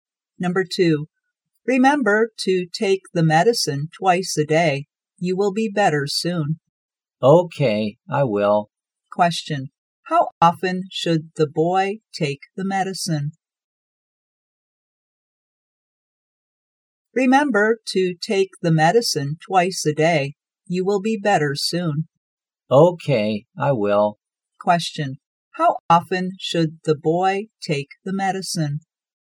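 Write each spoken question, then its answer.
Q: how often should the boy take the medicine?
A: Twice a day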